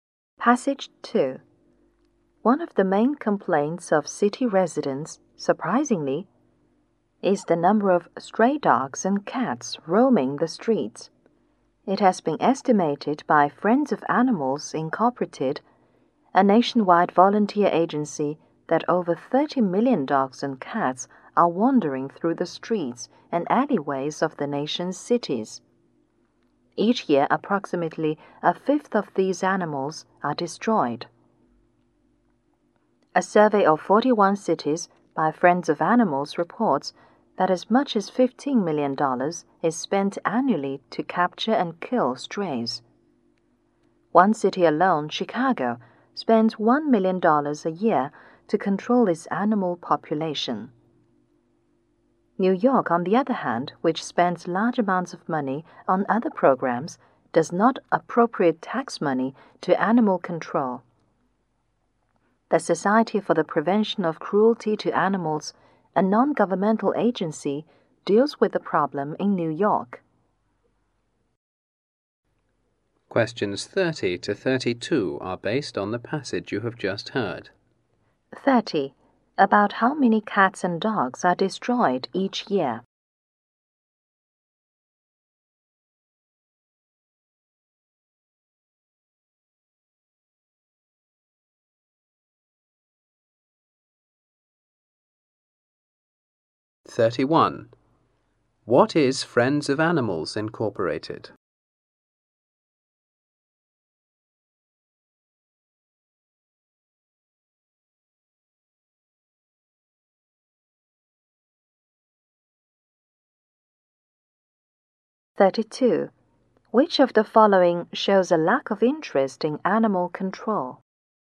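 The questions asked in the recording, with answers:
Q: About how many cats and dogs are destroyed each year?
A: About 6 million.

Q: What is Friends of Animals Incorporated?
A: A nationwide volunteer agency.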